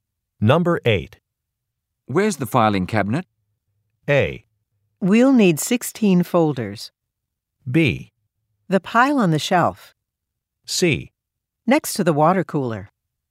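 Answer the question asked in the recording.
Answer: C: Next to the water cooler.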